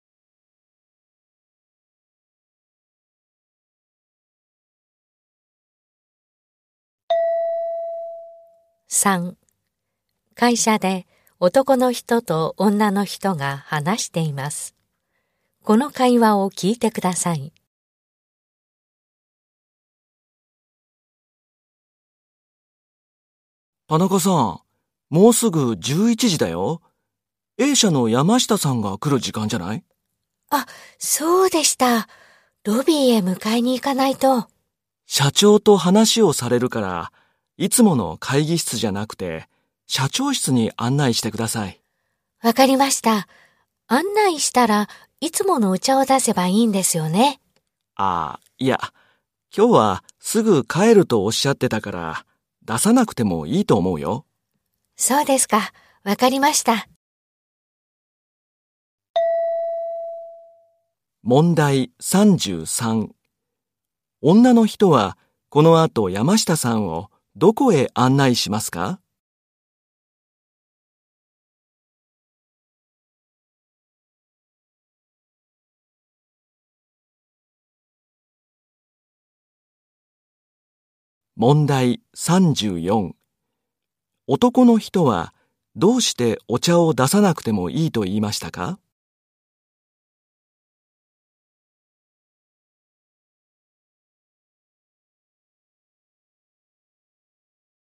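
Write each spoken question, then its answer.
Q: 女の人はこの後山下さんをどこへ案内しますか?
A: 社長室

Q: 男の人はどうしてお茶を出さなくてもいいと言いましたか?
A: 山下さんがすぐ帰ると言っていたから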